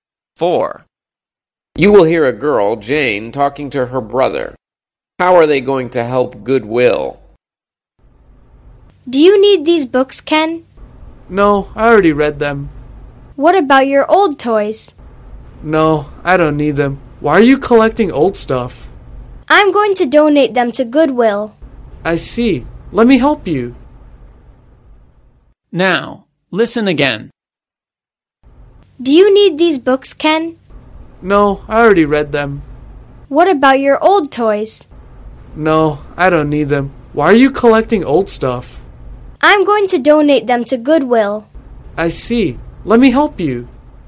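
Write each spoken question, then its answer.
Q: How are they going to help Goodwill?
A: By donating old books and toys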